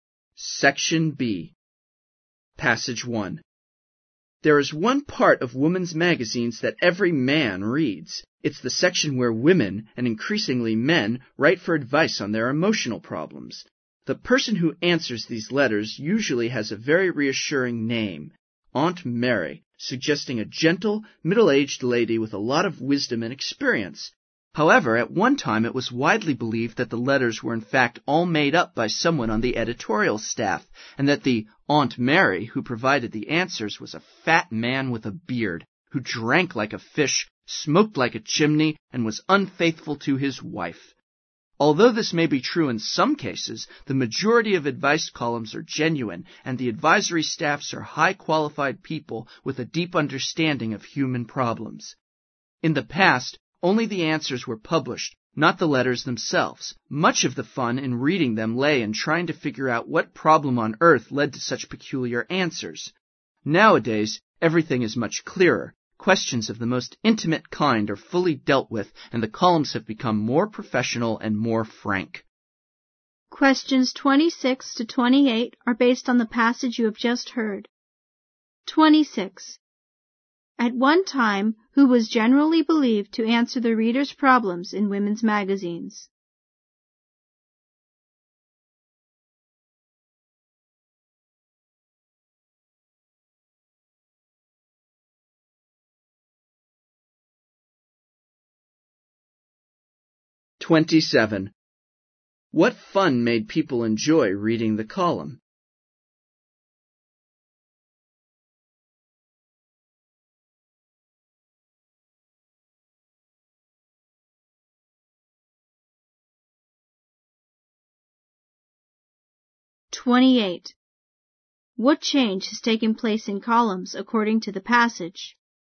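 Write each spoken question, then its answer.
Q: At one time, who was generally believed to answer the reader's problems in women's magazines?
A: A fat bearded man on the editorial staff

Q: What fun made people enjoy reading the column?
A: Trying to figure out what problem led to such peculiar answers

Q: What change has taken place in columns according to the passage?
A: They have become more professional and more frank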